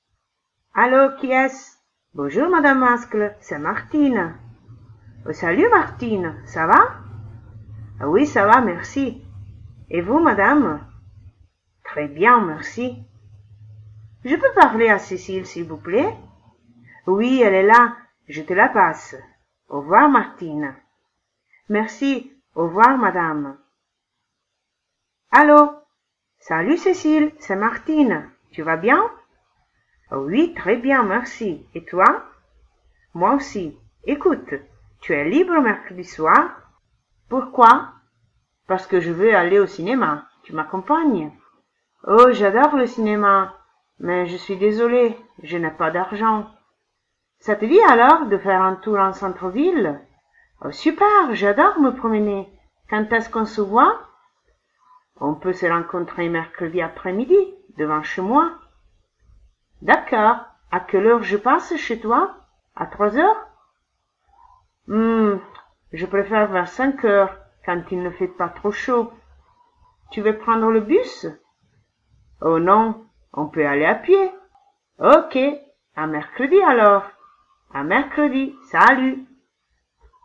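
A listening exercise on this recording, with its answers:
Clique sur l'enregistrement, écoute le dialogue plusieurs fois et réponds aux questions sur ton cahier.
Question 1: Qui répond au téléphone?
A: Madame Mascle, la mère de Cécile

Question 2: Qui cherche Martine?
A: Martine cherche Cécile

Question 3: Est-ce que son amie est à la maison?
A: Oui, elle est là

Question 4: Qu'est-ce qu'elle veut faire Martine mercredi soir?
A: Aller au cinéma

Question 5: Pourquoi son amie ne peut pas l'accompagner?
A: Parce qu'elle n'a pas d'argent

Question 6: Qu'est-ce qu'elle lui propose alors?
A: Faire un tour en centre-ville

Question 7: Quel jour et à quelle heure elles se rencontrent?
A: Mercredi après-midi, vers 5 heures

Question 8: Où est-ce qu'elles se donnent rendez-vous?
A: Devant chez Martine

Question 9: Pourquoi Martine demande de se voir un peu plus tard?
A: Parce qu'à 5 heures il ne fait pas trop chaud

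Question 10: Elles vont prendre le bus?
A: Non, elles vont aller à pied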